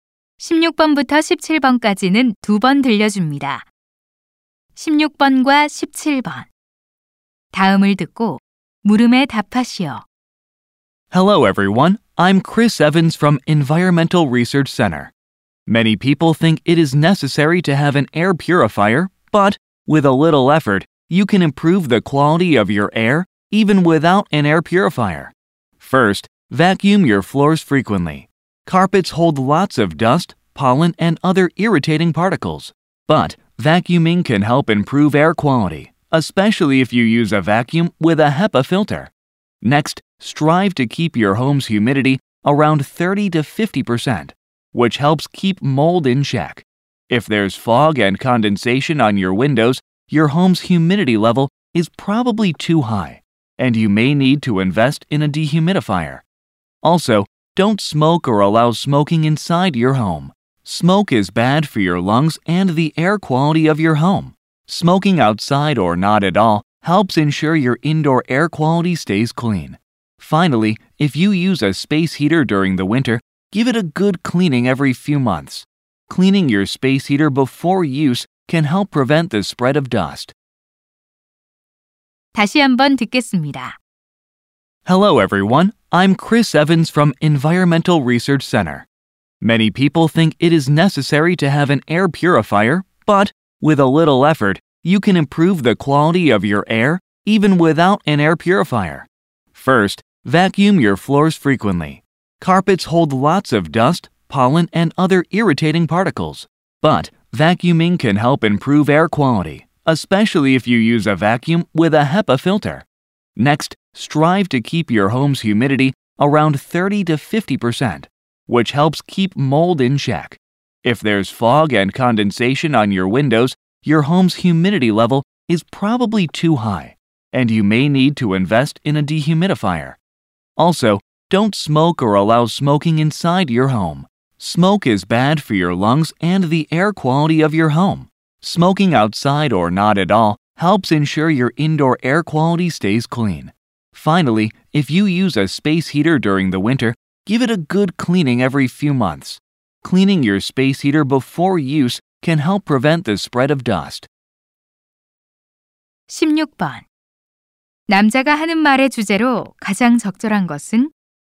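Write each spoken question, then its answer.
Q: 남자가 하는 말의 주제로 가장 적절한 것은?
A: 공기청정기 없이 실내 공기 질을 개선하는 방법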